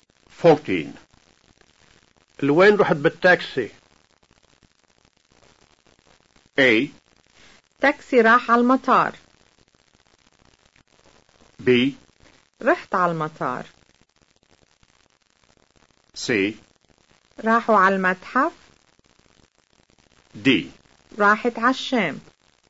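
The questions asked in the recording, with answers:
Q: لوين رحت بالتاكسي؟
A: B: رحت على المطار.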